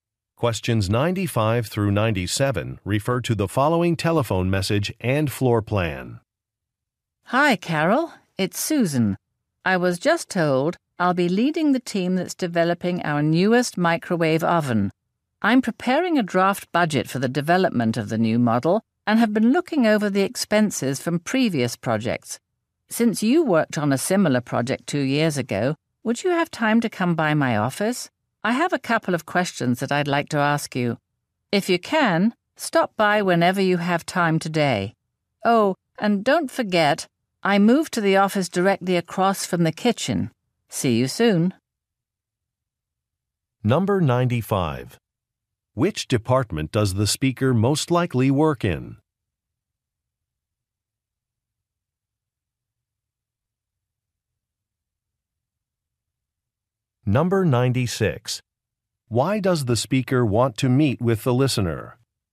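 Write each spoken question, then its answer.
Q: Why does the speaker want to meet with the listener?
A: To ask questions about a previous project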